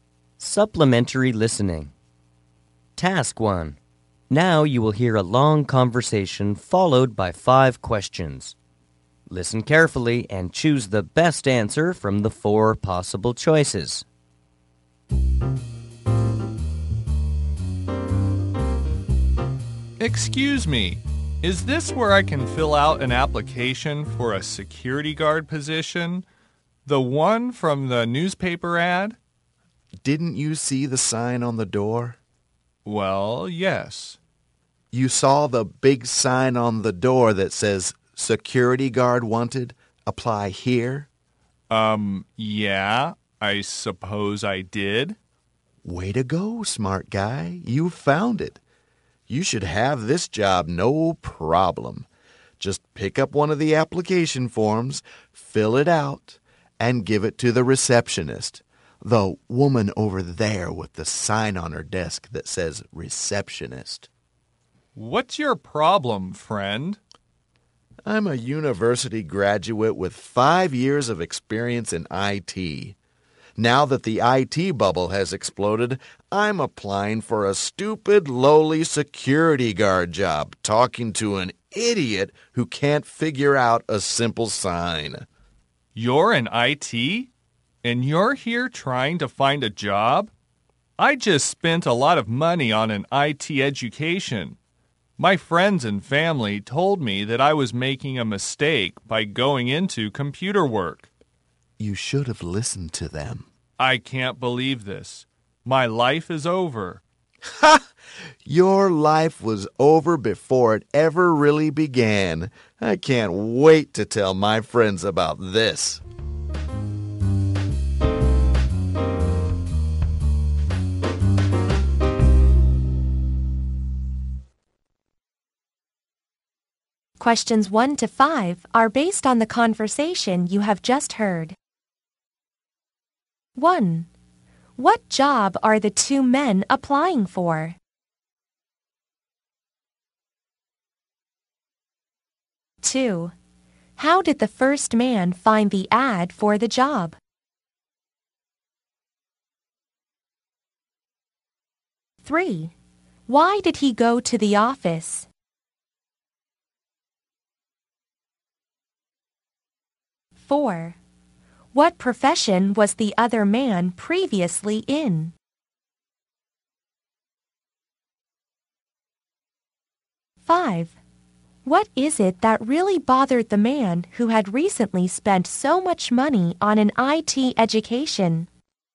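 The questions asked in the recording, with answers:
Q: What job are the two men applying for?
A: Security guard.

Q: How did the first man find the ad for the job?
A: In the newspaper.

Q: Why did he go to the office?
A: To fill out an application for the security guard job.

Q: What profession was the other man previously in?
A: IT.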